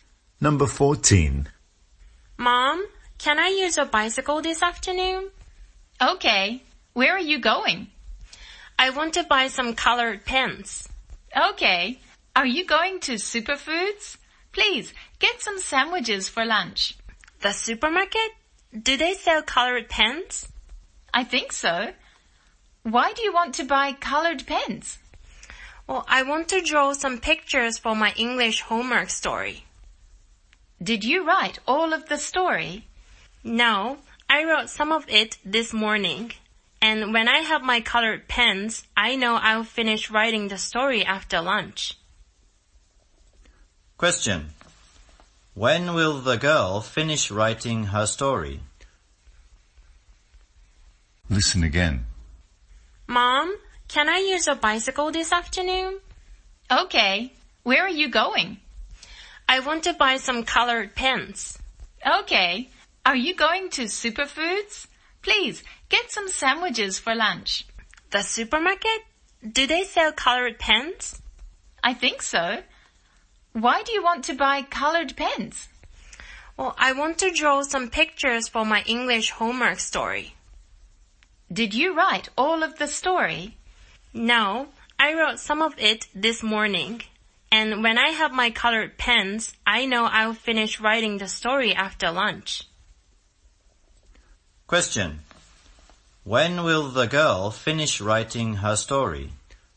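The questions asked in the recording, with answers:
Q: When will the girl finish writing her story?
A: After lunch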